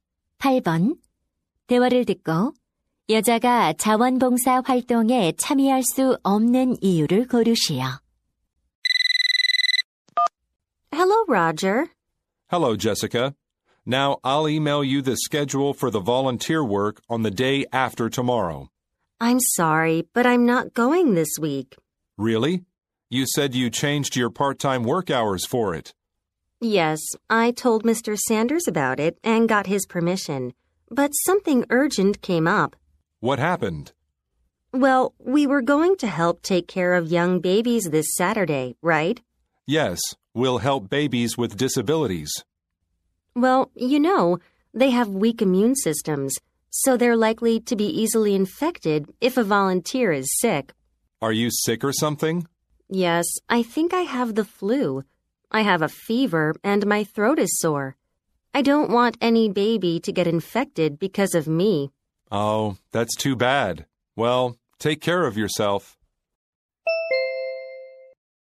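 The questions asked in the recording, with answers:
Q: 여자가 자원봉사 활동에 참여할 수 없는 이유를 고르시오.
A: 독감에 걸려서 아기들에게 옮길까 봐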